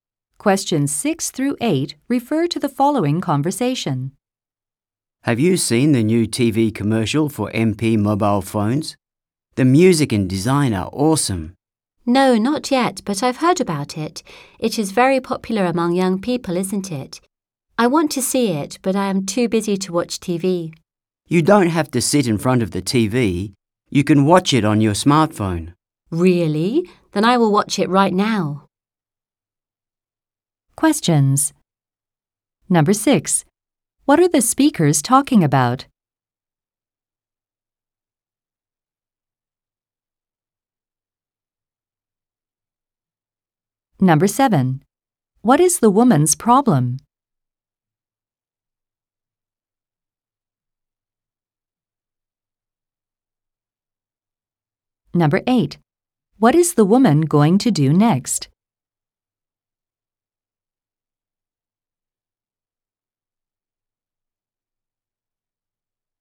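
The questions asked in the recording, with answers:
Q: What are the speakers talking about?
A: A new TV commercial for MP mobile phones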